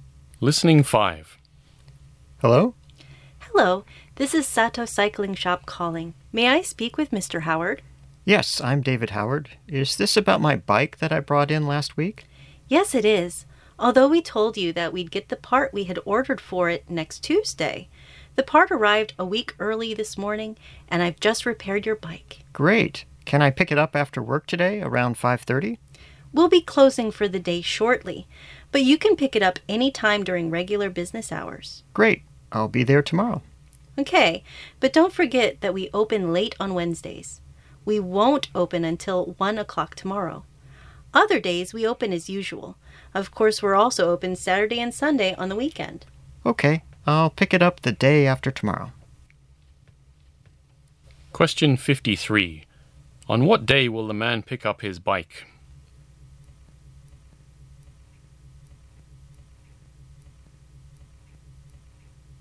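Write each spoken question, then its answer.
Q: On what day will the man pick up his bike?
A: Thursday (the day after tomorrow)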